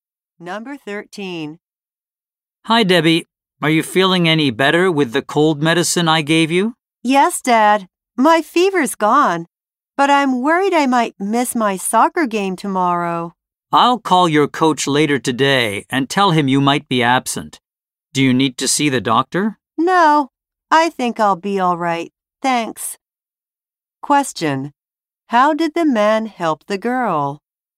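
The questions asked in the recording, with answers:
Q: How did the man help the girl?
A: He gave her cold medicine.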